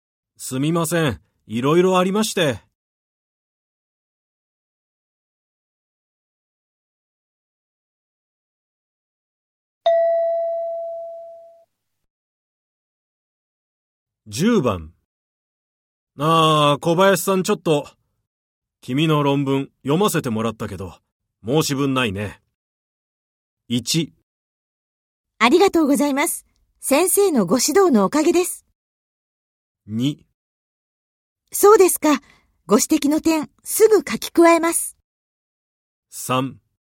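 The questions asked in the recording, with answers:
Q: ああ、小林さんちょっと、君の論文読ませてもらったけど、申し分ないね。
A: 1: ありがとうございます。先生のご指導のおかげです。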